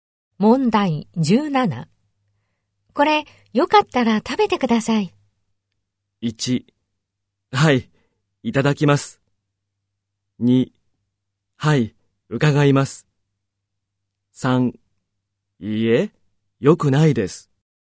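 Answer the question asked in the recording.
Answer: 1: はい、いただきます。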